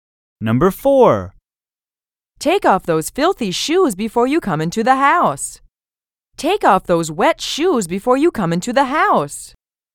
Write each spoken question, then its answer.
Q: Take off those wet shoes before you come into the house.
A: Different is the correct answer.